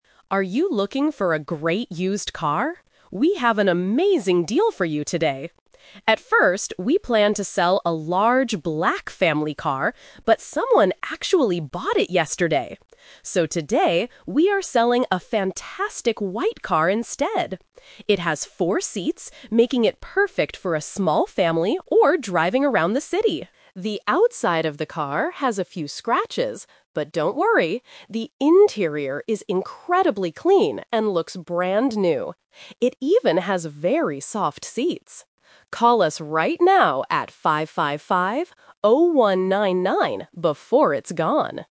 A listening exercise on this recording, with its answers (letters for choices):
Listen to the radio advertisement and choose the correct answer (A, B, or C).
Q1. What color is the car that is for sale today?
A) Black.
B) Silver.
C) White.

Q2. How many seats does the car have?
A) Two seats.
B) Four seats.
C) Six seats.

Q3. What does the announcer say about the inside (interior) of the car?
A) It looks brand new.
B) It has a few scratches.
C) It needs to be cleaned.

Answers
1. C
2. B
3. A

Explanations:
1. The announcer uses the "Twist" technique: "So today, we are selling a fantastic white car instead." The Trap: Option (A) is a trap. The seller planned to sell a black car, but someone bought it yesterday. Option (B) is a common car color but is never mentioned in the audio.
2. The announcer clearly states, "It has four seats..." The Trap: Option (A) and Option (C) are plausible guesses for car sizes, but they are not mentioned in the audio.
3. The announcer explicitly says, "The interior is incredibly clean and looks brand new." The Trap: Option (B) is a trap because the audio mentions "a few scratches," but that is on the outside of the car, not the inside. Option (C) is the exact opposite of the truth.

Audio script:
Announcer: Are you looking for a great used car? We have an amazing deal for you today! At first, we planned to sell a large black family car, but someone actually bought it yesterday. So today, we are selling a fantastic white car instead. It has four seats, making it perfect for a small family or driving around the city. The outside of the car has a few scratches, but don't worry! The interior is incredibly clean and looks brand new. It even has very soft seats. Call us right now at 555-0199 before it's gone!

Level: A2